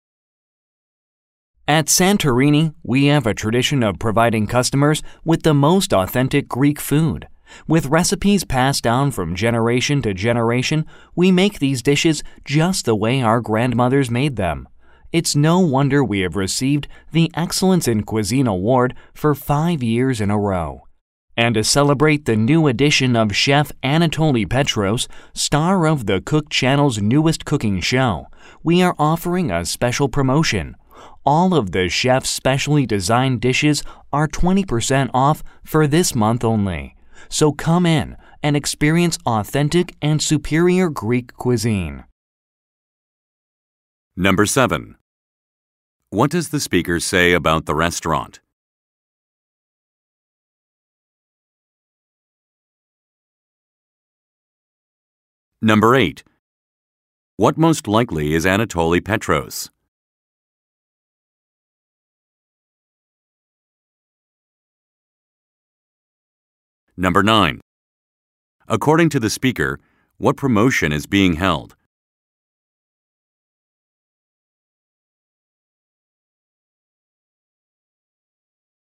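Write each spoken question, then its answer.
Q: What most likely is Anatoly Petros?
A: A chef who stars in a TV cooking show

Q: According to the speaker, what promotion is being held?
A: 20% off the new chef's specially designed dishes this month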